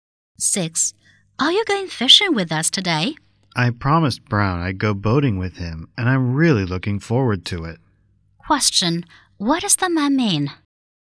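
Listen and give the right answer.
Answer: He won't go fishing; he is going boating with Brown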